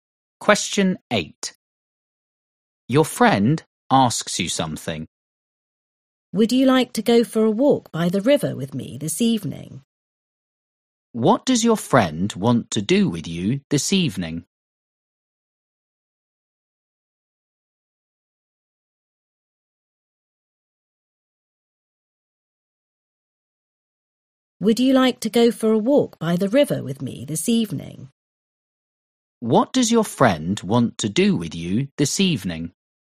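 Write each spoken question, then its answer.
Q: What does your friend want to do with you this evening?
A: Go for a walk by the river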